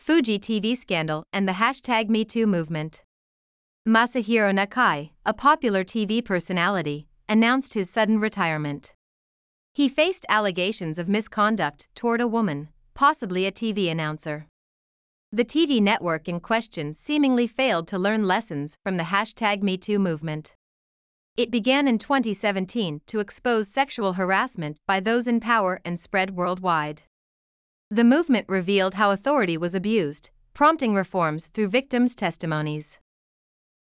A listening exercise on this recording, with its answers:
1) He ( ), possibly a TV announcer.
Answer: faced allegations of misconduct toward a woman

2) The TV network ( ) from the #MeToo movement.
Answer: in question seemingly failed to learn lessons

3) It began in 2017 to ( ) and spread worldwide.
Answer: expose sexual harassment by those in power

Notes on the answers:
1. ⇒「allegations of A(Aの容疑)」という形で覚えておきましょう。Aには名詞(または動名詞)が入ります。下線の部分は「子音+母音」で音がリンキングします。
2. ⇒ 「A in question(問題のA)」の形で覚えておきましょう。Aには名詞(今回は「The TV network」)が入ります。
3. ⇒ 「those in power(権力を持っている人たち)」で覚えておきましょう。こちらも語彙力が問われる設問です。

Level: 中級脱出